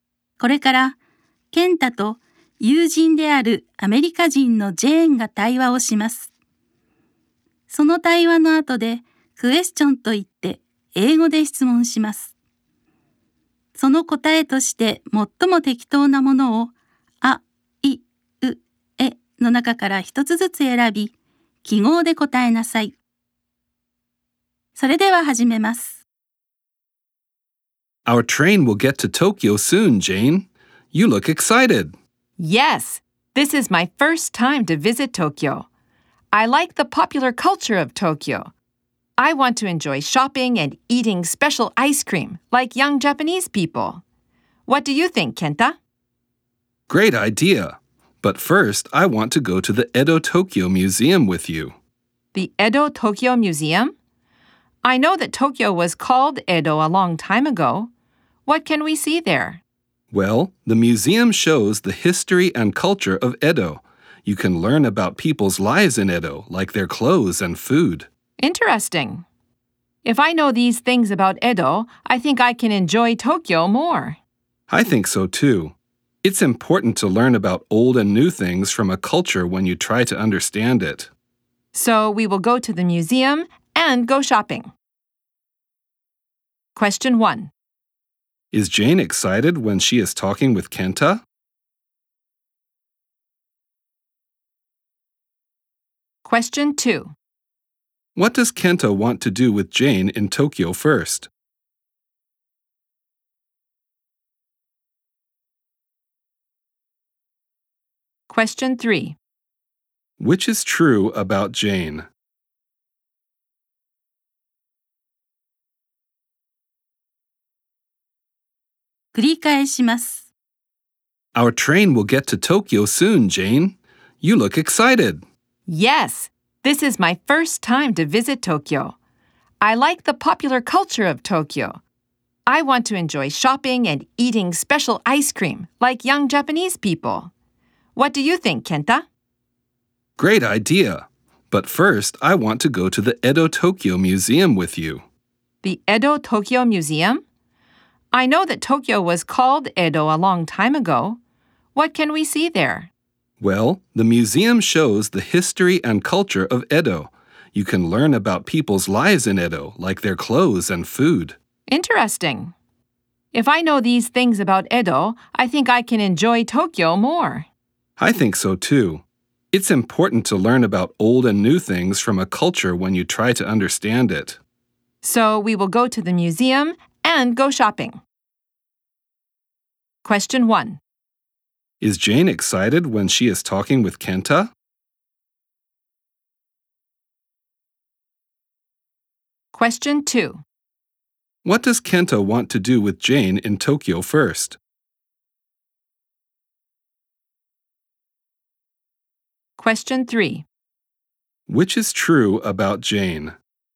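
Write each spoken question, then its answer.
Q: Is Jane excited when she is talking with Kenta?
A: Yes, she is.

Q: What does Kenta want to do with Jane in Tokyo first?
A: Go to the Edo Tokyo Museum.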